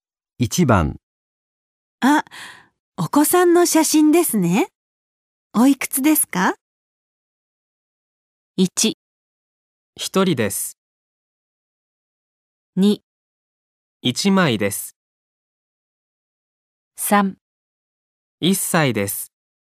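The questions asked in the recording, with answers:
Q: あ、お子さんの写真ですね。おいくつですか?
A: 3: 1歳です。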